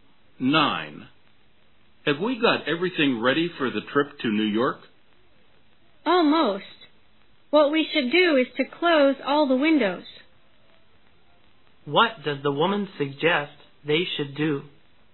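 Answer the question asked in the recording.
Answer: Close all the windows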